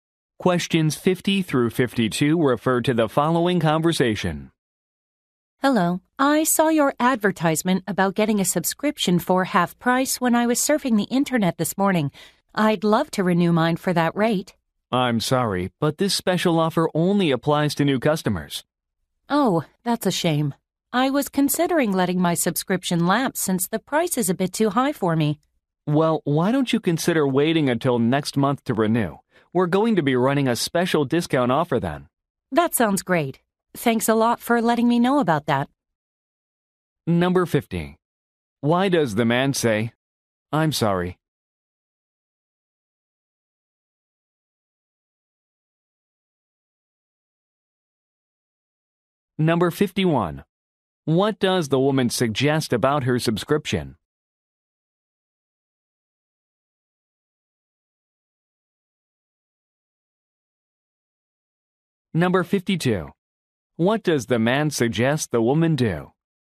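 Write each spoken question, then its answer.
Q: Why does the man say, "I'm sorry"?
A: The offer only applies to new customers

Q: What does the woman suggest about her subscription?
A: She may let it lapse because it is too expensive

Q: What does the man suggest the woman do?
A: Wait until next month to renew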